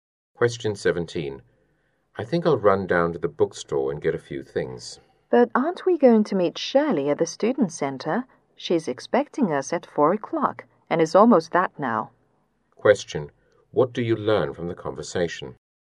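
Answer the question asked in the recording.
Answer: They don't have time to go to the bookstore before meeting Shirley at 4.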